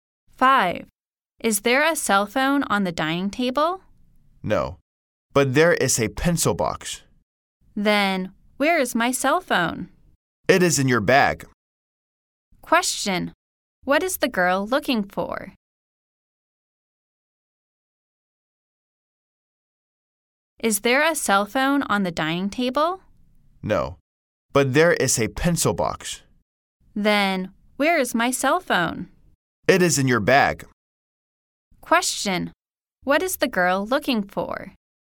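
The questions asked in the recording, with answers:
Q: What is the girl looking for?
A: Her cell phone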